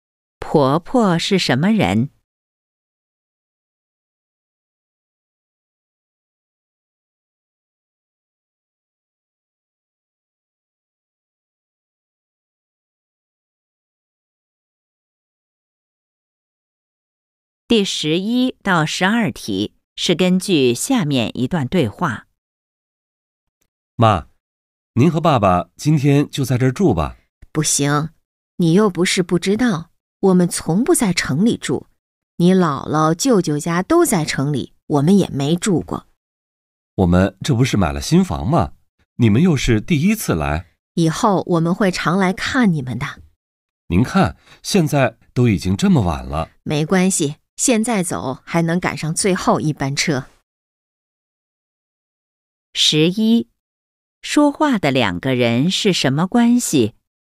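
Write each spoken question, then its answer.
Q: 说话的两个人是什么关系?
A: 母女(母子)

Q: 妈妈最后的决定是什么?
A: 不住,赶最后一班车回去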